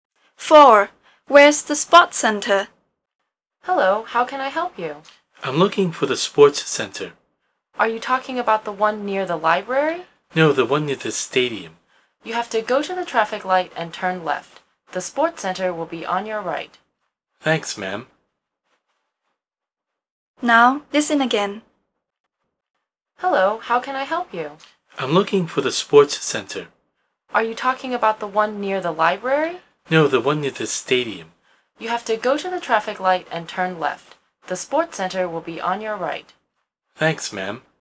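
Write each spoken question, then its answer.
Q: Where's the sports center?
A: Near the stadium: turn left at the traffic light, and it's on the right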